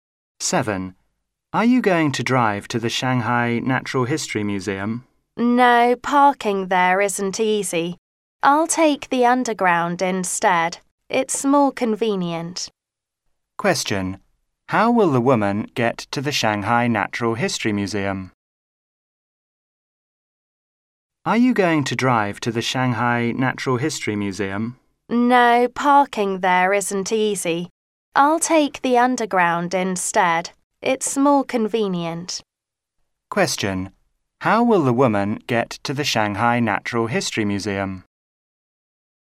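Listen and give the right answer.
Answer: By underground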